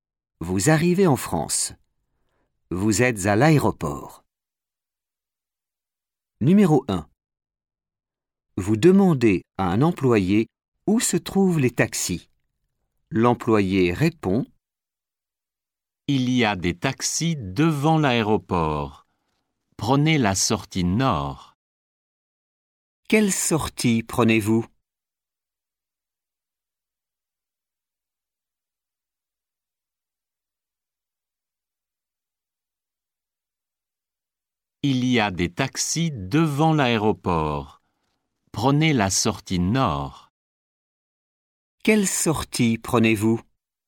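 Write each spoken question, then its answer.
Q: Quelle sortie prenez-vous?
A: La sortie nord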